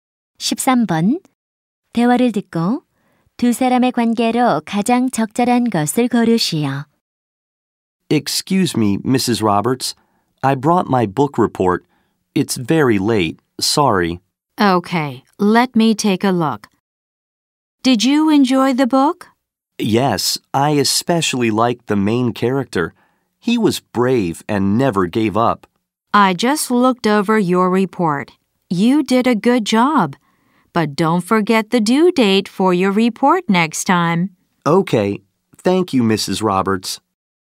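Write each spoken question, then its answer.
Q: 대화를 듣고 두 사람의 관계로 가장 적절한 것을 고르시오.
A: 교사와 학생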